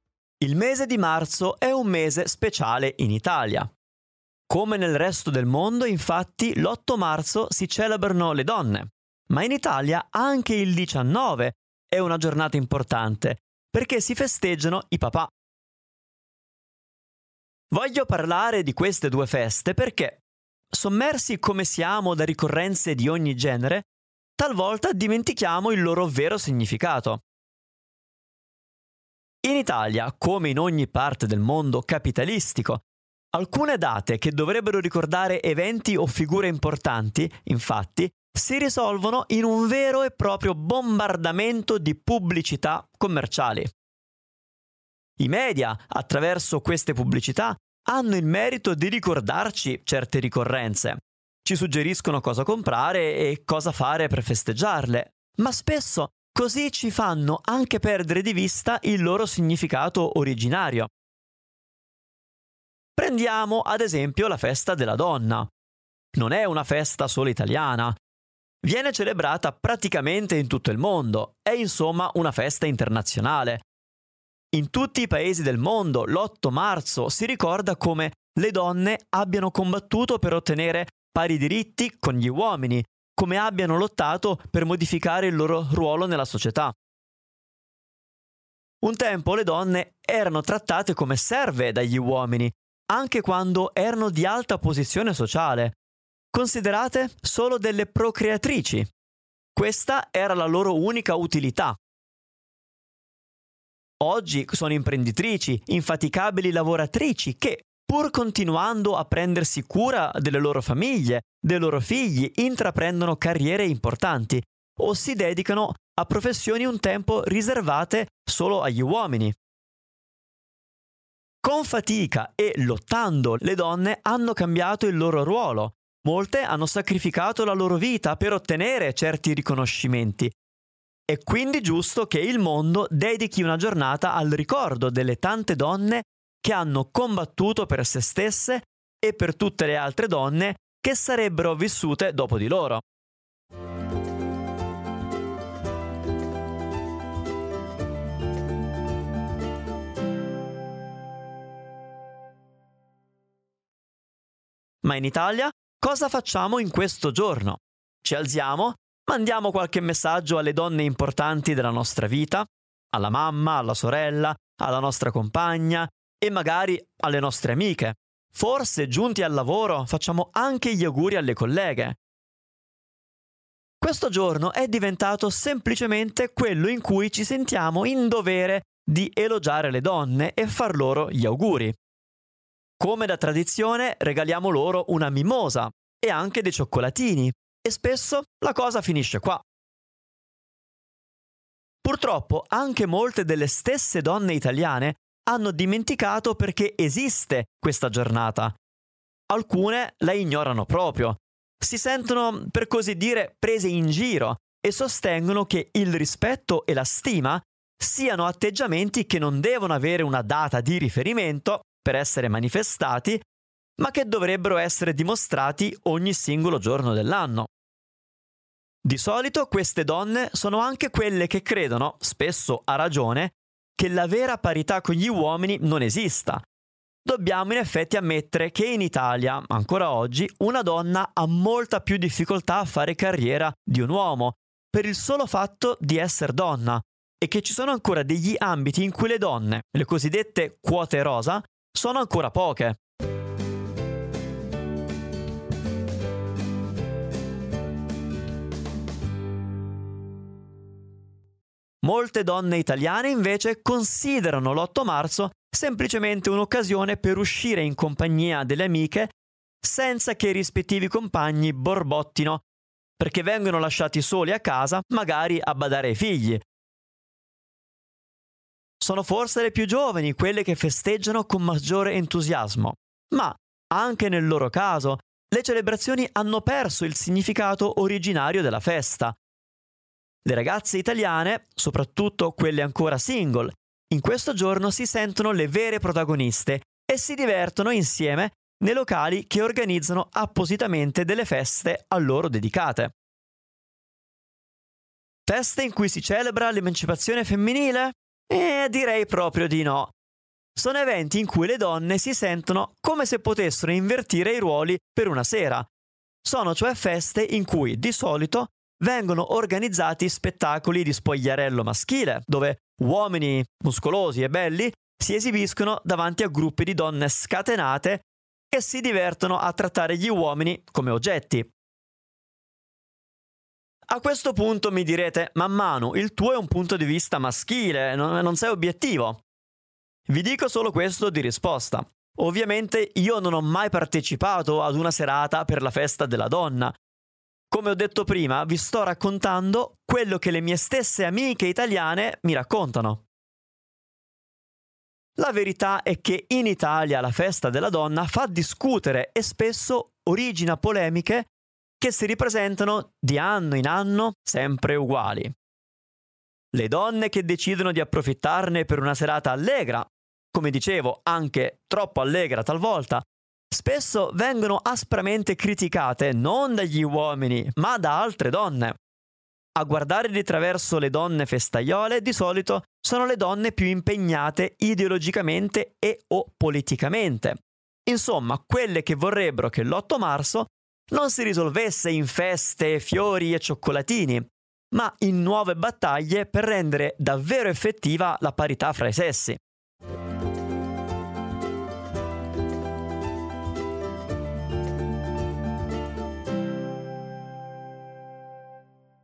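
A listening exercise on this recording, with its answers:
Here are your TRUE/ FALSE Comprehension questions.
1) La pubblicità fatta dai media ci aiuta a ricordare le ricorrenze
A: Vero

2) La Festa della Donna è una festa tipicamente italiana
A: Falso

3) Nei secoli fino ad oggi il ruolo della donna è molto cambiato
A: Vero

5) Tutte le donne italiane festeggiano l'8 marzo con entusiasmo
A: Falso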